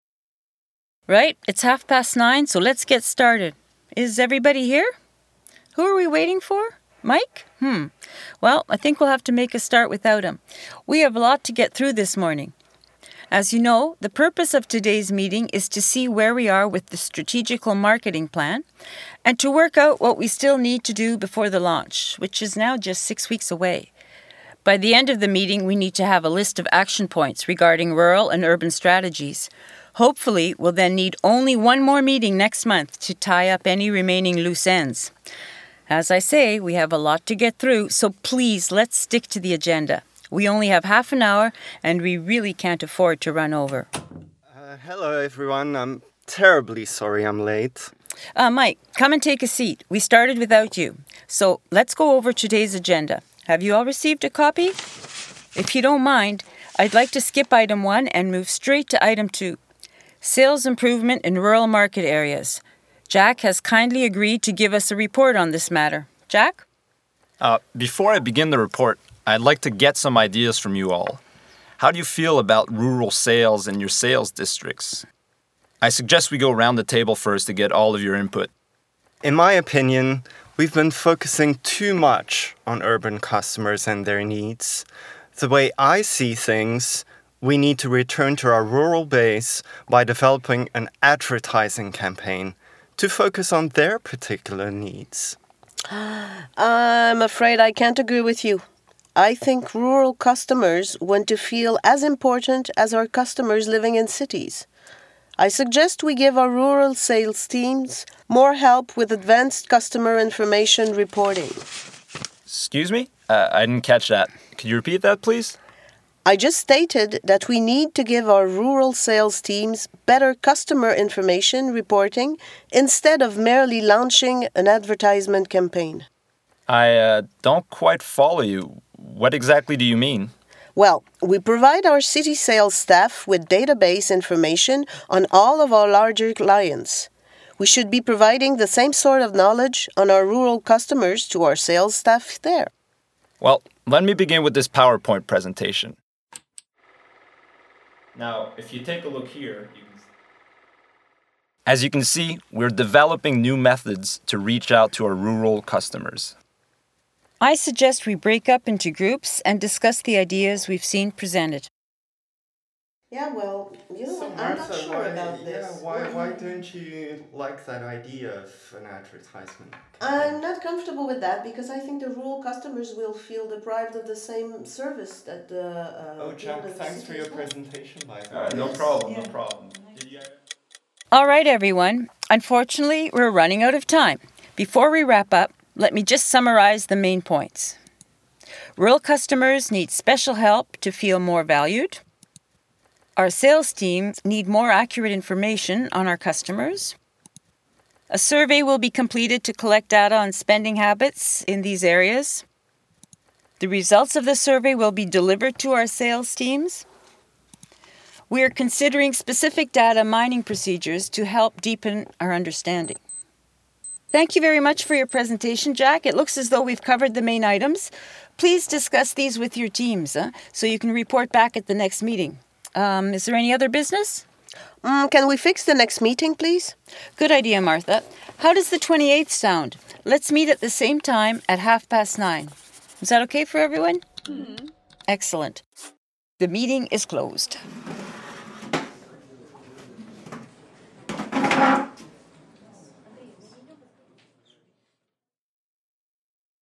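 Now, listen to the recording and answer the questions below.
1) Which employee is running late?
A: Mike

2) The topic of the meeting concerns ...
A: the strategic marketing plan before the launch

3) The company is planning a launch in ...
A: six weeks

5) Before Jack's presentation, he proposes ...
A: to go around the table to get everyone's ideas

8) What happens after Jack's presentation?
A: They break up into groups to discuss the ideas

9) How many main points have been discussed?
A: five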